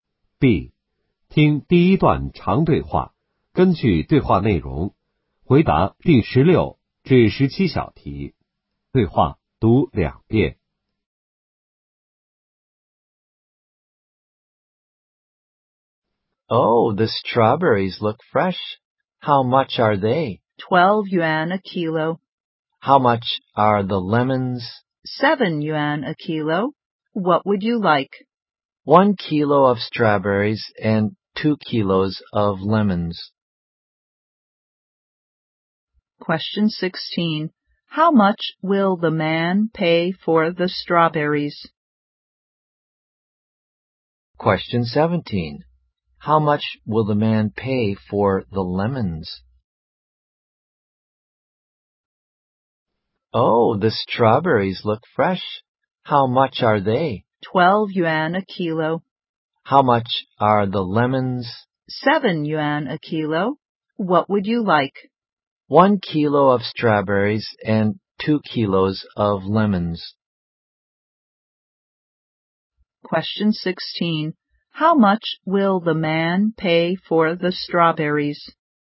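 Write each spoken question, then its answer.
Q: How much will the man pay for the strawberries?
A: 12 yuan

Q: How much will the man pay for the lemons?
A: 14 yuan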